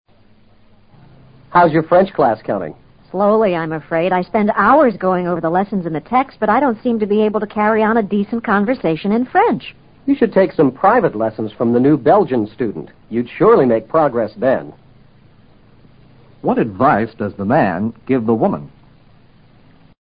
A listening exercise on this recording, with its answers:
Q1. What advice does the man give the woman?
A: He suggests that she get a tutor.